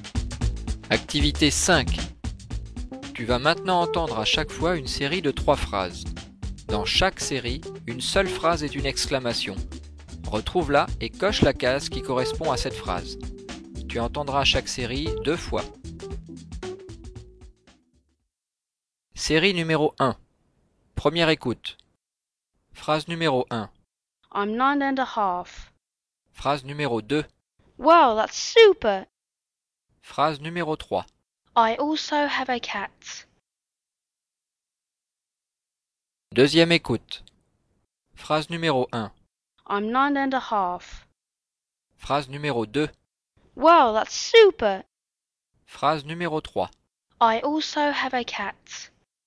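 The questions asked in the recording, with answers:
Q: Dans chaque série, une seule phrase est une exclamation. Retrouve-la et coche la case qui correspond à cette phrase.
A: Phrase 2: Wow, that's super.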